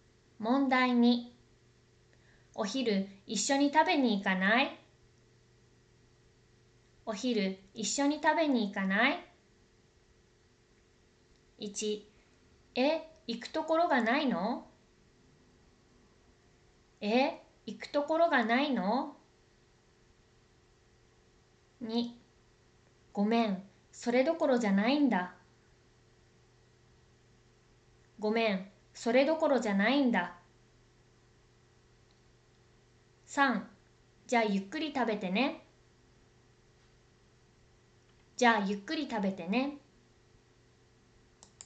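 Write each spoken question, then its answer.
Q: お昼一緒に食べに行かない?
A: 2: ごめん、それどころじゃないんだ。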